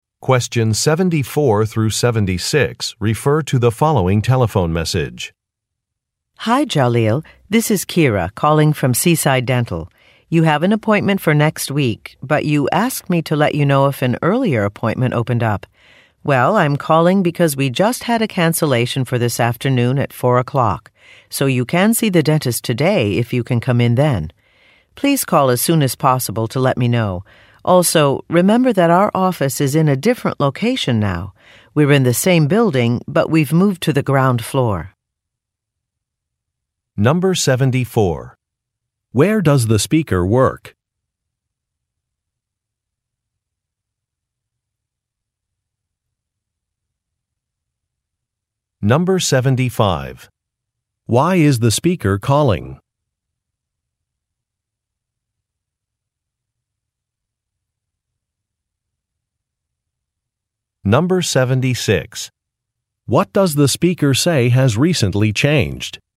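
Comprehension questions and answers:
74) Where does the speaker work?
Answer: At a dental office

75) Why is the speaker calling?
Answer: To offer a different appointment time

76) What does the speaker say has recently changed?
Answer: A business location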